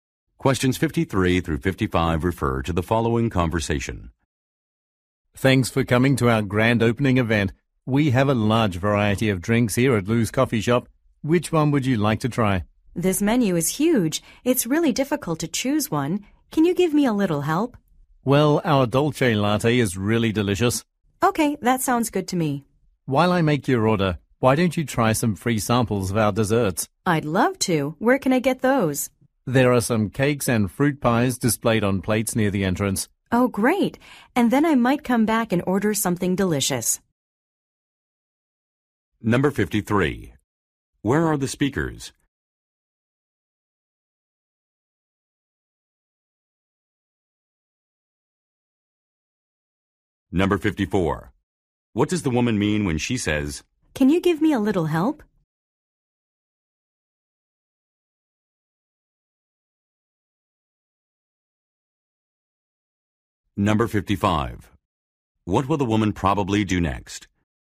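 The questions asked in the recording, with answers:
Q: Where are the speakers?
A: At a coffee shop

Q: What does the woman mean when she says,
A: She wants a recommendation

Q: What will the woman probably do next?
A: Try free dessert samples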